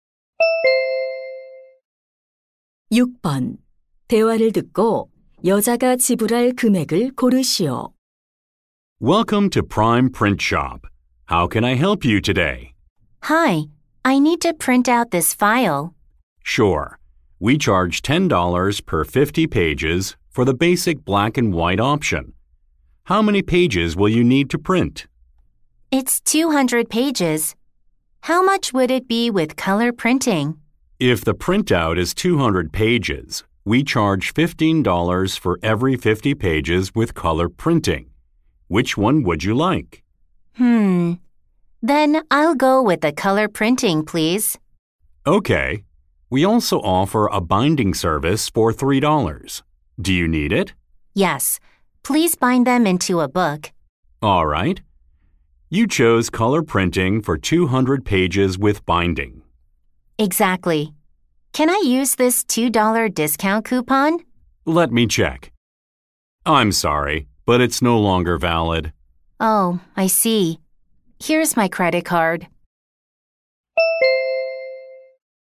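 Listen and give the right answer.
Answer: $63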